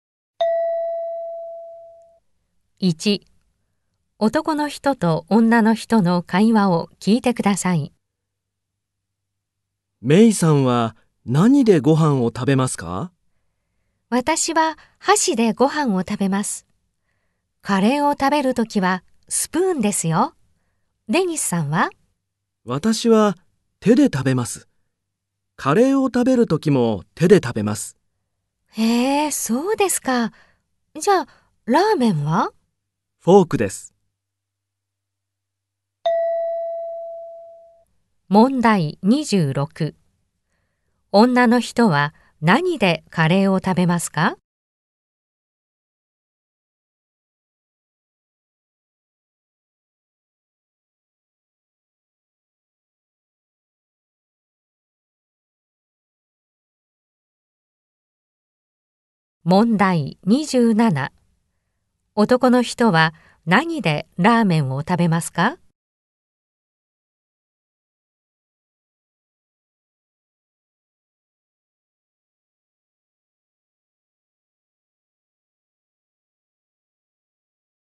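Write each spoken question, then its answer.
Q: 女の人は何でカレーを食べますか?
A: スプーン

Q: 男の人は何でラーメンを食べますか?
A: フォーク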